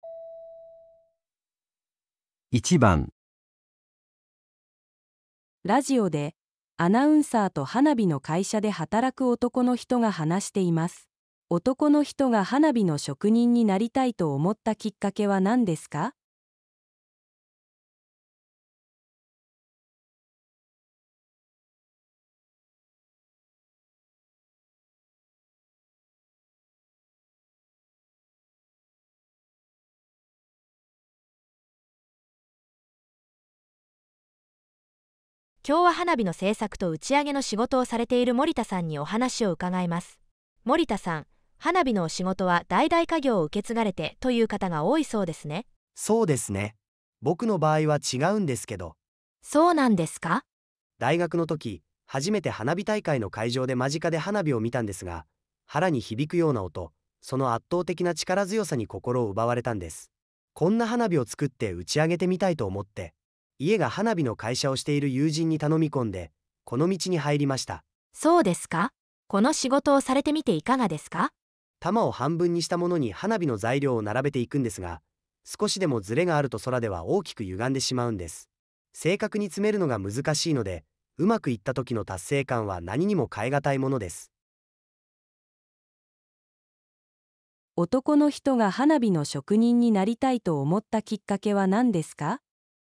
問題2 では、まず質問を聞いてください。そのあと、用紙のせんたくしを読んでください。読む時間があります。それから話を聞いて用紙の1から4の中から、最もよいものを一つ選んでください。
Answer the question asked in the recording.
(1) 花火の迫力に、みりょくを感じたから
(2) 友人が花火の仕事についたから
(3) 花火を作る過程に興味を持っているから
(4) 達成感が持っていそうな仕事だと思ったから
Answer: (1) 花火の迫力に、みりょくを感じたから

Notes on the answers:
问题:男性想成为烟花工匠的契机是什么? 正确选项:1. 被烟花的震撼力所吸引 1.✅正确 → 直接对应「花火の圧倒的な力強さに心を奪われた」(被烟花的压倒性力量震撼),这是触发他入行的核心动机。 2.❌错误 → 朋友的作用是「提供入行途径」,并非动机本身("友人に頼み込んで"是行动手段,非原因)。 3.❌错误 → 制作过程的兴趣是入行后的体验(「正確に詰めるのが難しい」属于工作细节描述),非最初契机。 4.❌错误 → 成就感是从事工作后的感受(「達成感は何にも変え難い」),属于后续体验而非初衷。 关键点梳理: 时间轴区分:注意对话中「きっかけ」(契机)与「仕事の感想」(工作感想)的明确分界。 核心句锁定:「心を奪われた」直接指向对烟花本身的震撼体验,其他选项均为干扰信息。

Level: N1